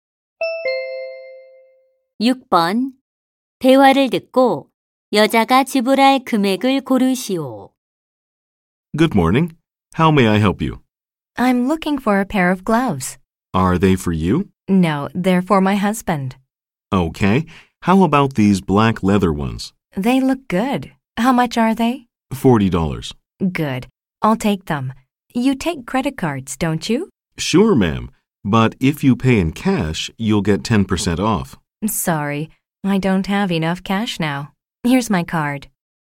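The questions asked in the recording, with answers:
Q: 대화를 듣고 여자가 지불할 금액을 고르시오.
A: 40달러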